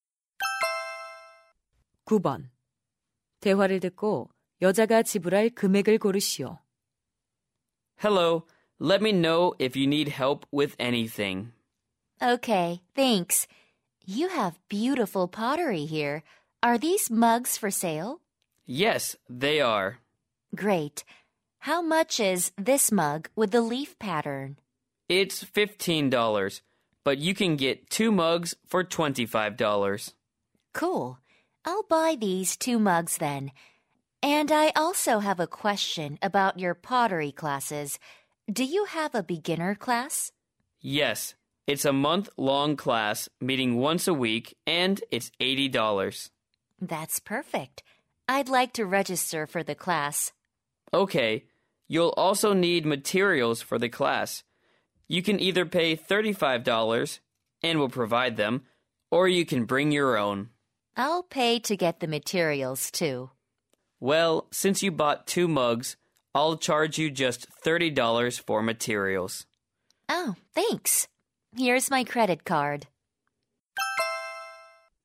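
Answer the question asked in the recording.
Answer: 135달러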